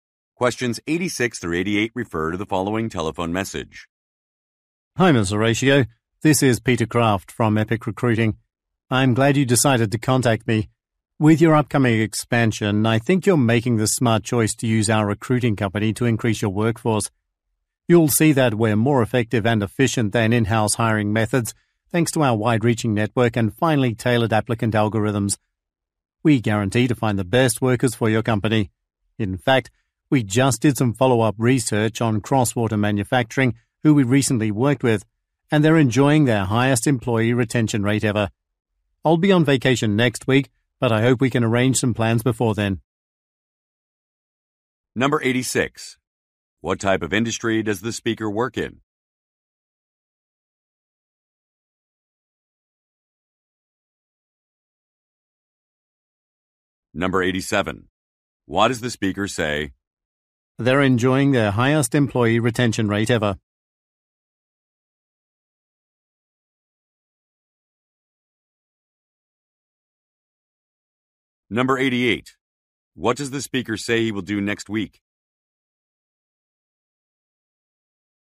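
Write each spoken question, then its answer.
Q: What type of industry does the speaker work in?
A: Recruiting

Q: What does the speaker say he will do next week?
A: Go on vacation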